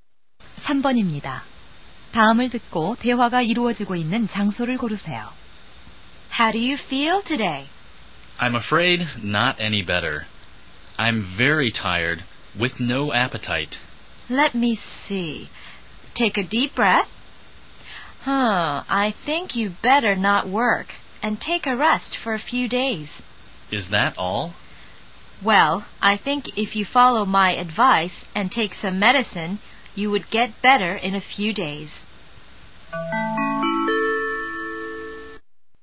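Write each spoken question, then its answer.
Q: 다음을 듣고 대화가 이루어지고 있는 장소를 고르세요.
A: 병원(진료실)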